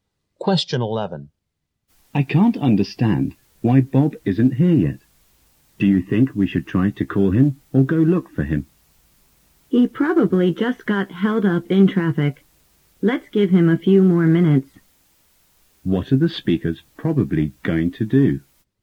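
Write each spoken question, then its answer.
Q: What are the speakers probably going to do?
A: Wait a few more minutes for Bob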